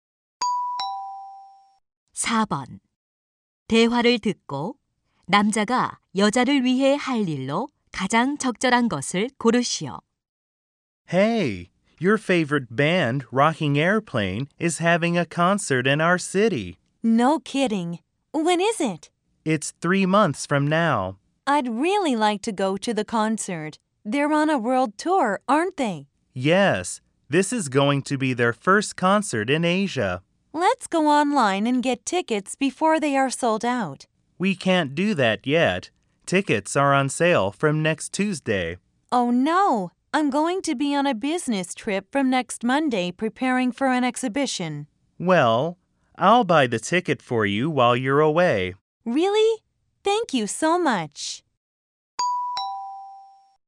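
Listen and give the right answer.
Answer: 콘서트 티켓 대신 구매하기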